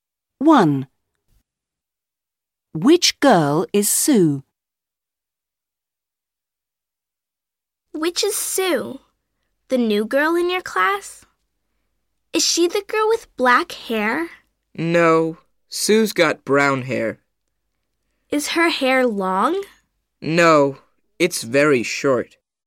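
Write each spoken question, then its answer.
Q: Which girl is Sue?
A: The girl with very short brown hair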